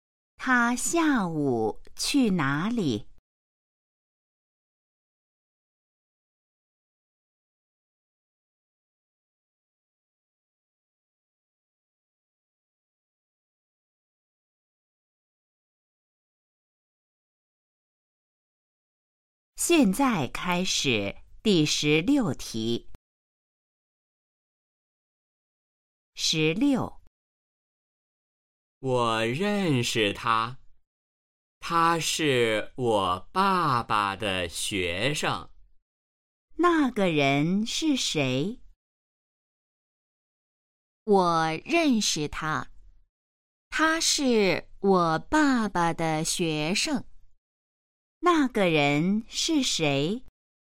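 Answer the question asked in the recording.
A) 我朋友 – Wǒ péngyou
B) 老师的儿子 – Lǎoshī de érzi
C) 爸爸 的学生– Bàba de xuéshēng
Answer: C) 爸爸 的学生– Bàba de xuéshēng

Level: HSK1- Đề 04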